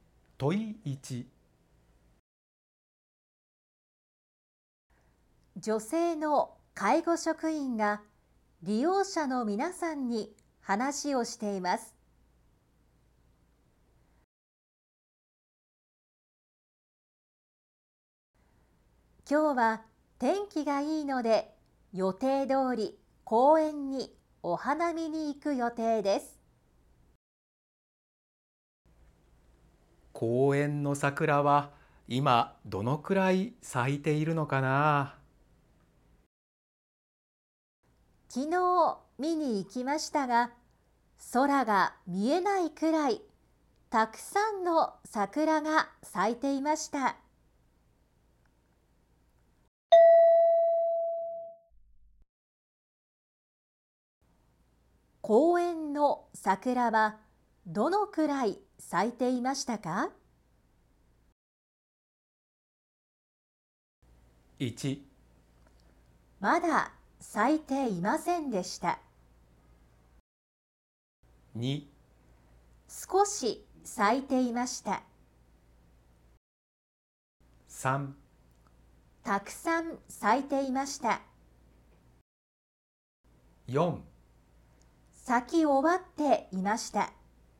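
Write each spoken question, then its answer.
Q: 公園の桜はどのくらい咲いていましたか。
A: 3: たくさん咲いていました。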